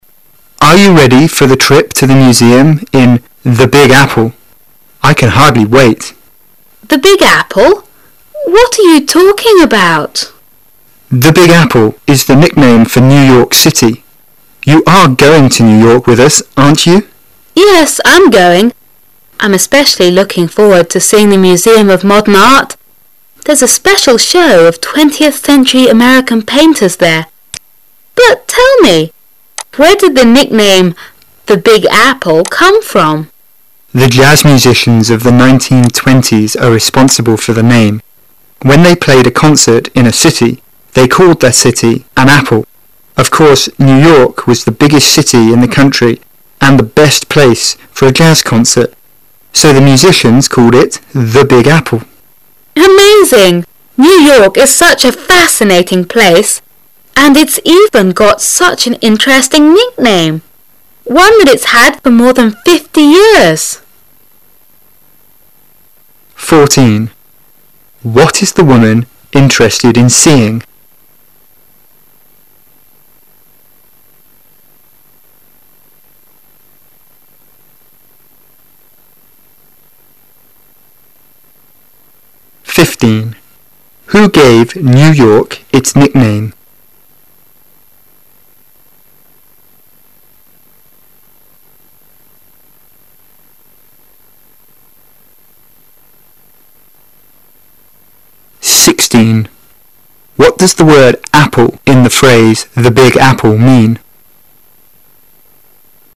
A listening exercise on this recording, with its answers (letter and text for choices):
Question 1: Who gave New York its nickname?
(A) Artists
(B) Musicians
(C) Grocers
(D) Tour guides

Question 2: What does the word "apple" in the phase "The Big Apple" mean?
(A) An instrument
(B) A concert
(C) A theater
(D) A city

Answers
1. (B) Musicians
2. (D) A city

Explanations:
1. 事件与情景题,由男士第三次的话中可听出答案。
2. 事件与情景题,本题目较难,需要读者从男士第三次的话中推断。

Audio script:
[解析] 14-16 Man: Are you ready for the trip to the museums in "The Big Apple"? I can hardly wait! Woman: "The Big Apple"? What are you talking about? Man: "The Big Apple" is the nickname for New York City. You are going to New York with us, aren't you? Woman: Yes, I'm going, I'm especially looking forward to seeing the museum of modem art. There's a special show of twentieth--century American painters there, But, tell me, where did the nickname "The Big Apple" come from? Man: The jazz musicians of the 1920's are responsible for the name, When they played a concert in a city, they called that city "an apple". Of course, New York was the biggest city in the country and the best place for a jazz concert. So, the musicians called it "The Big Apple". Woman: Amazing! New York is such a fascinating place and it even got such an interesting nickname, one that it's had for more than fifty years. What is the woman interested in seeing?